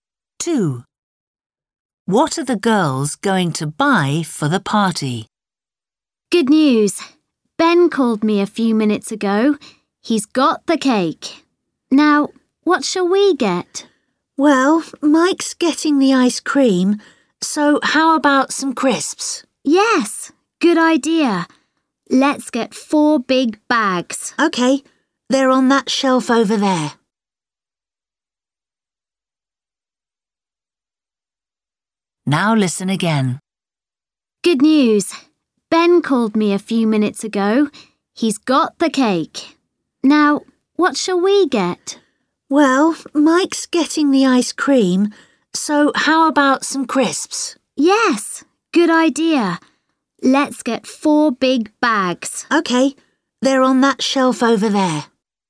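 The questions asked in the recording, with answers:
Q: What are the girls going to buy for the party?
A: crisps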